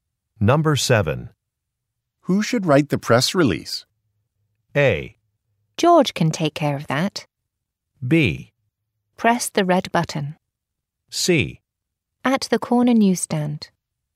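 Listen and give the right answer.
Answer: A: George can take care of that.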